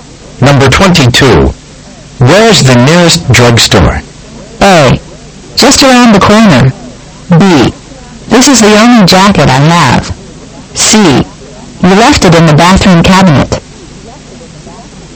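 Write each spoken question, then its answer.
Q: Where's the nearest drugstore?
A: A: Just around the corner.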